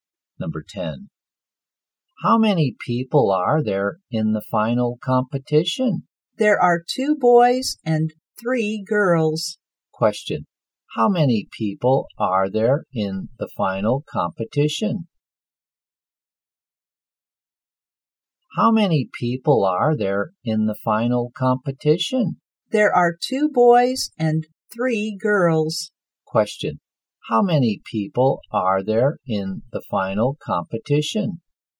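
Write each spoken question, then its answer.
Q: How many people are there in the final competition?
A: Five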